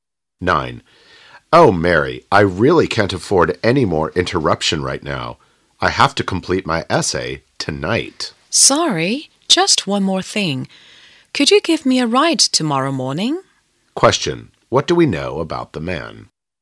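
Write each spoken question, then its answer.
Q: What do we know about the man?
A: He is busy and must finish his essay tonight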